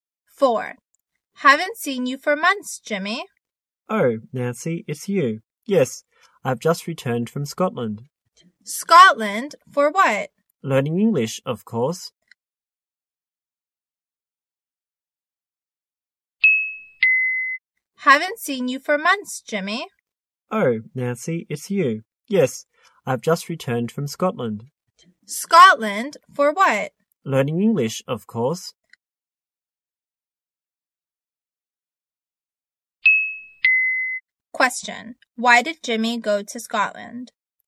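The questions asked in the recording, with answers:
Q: Why did Jimmy go to Scotland?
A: To learn English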